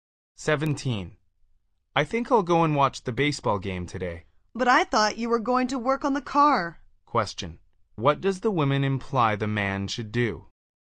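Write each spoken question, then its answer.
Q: what does the woman imply the man should do?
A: Work on the car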